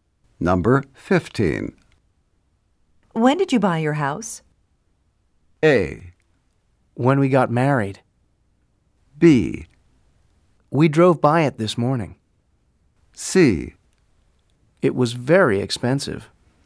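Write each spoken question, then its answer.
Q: When did you buy your house?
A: A: When we got married.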